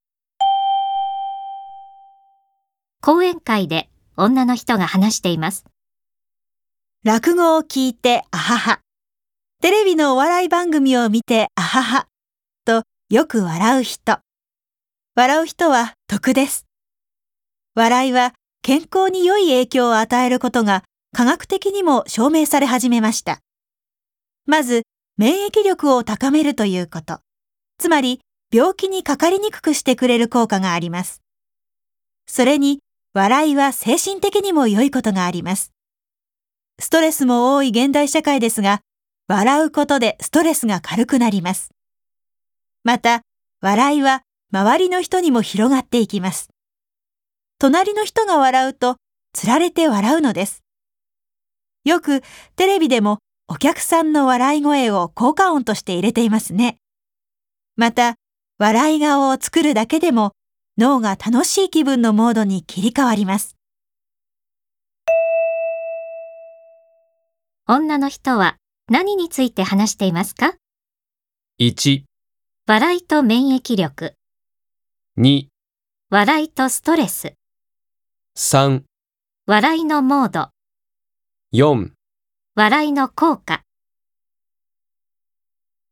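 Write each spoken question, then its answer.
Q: 女の人は何について話していますか?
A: 4: 笑いの効果。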